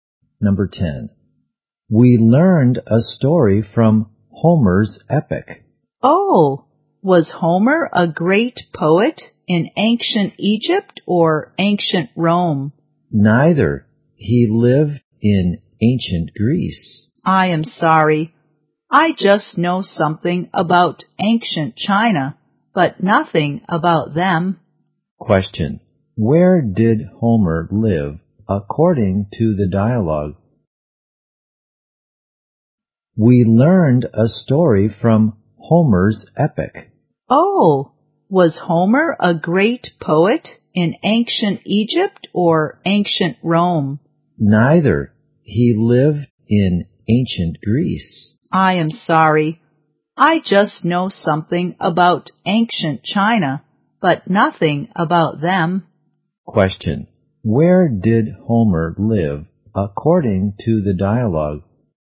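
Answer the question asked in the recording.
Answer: In ancient Greece.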